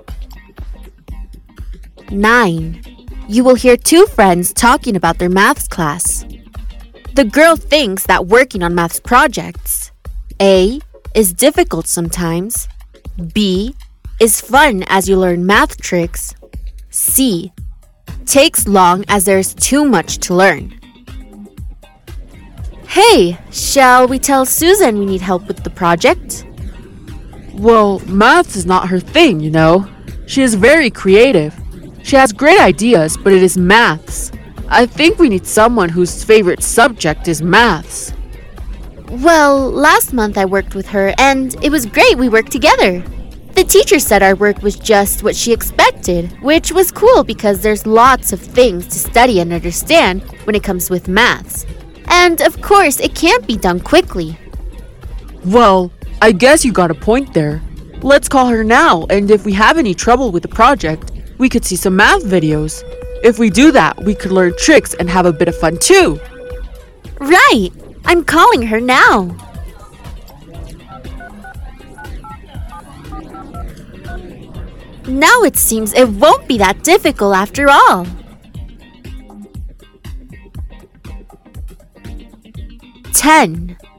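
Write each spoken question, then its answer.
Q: The girl thinks that working on maths projects, A, is difficult sometimes, B, is fun as you learn math tricks, C, takes long as there's too much to learn.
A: C: takes long as there's too much to learn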